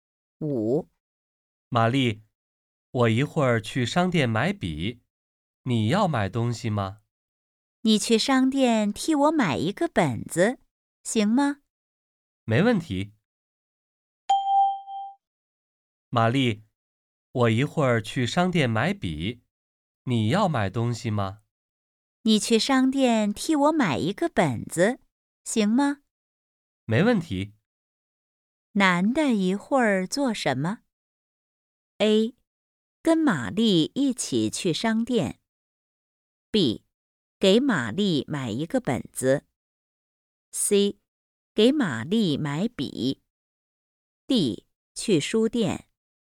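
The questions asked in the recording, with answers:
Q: 男的一会儿做什么?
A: B: 给玛丽买一个本子。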